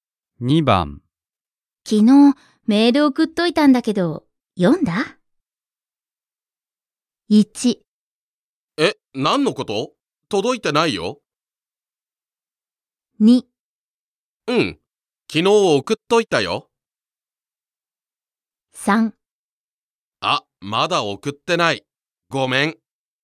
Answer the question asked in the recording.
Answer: 1番です。Choice 1. え、何のこと?届いてないよ。